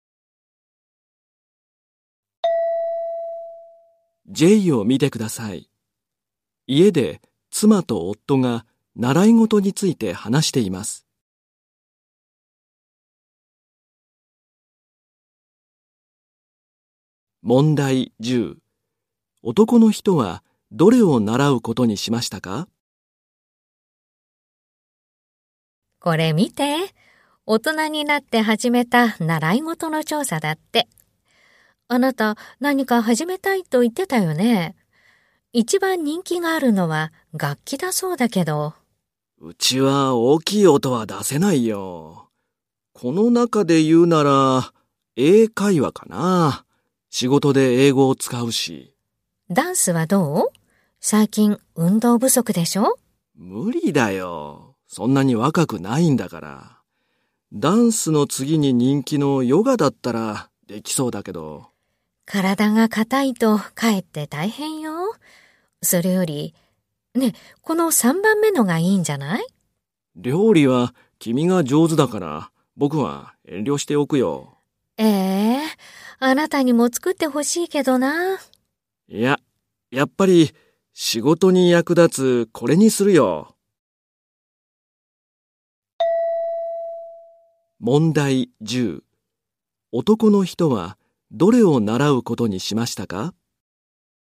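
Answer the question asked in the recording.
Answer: 英会話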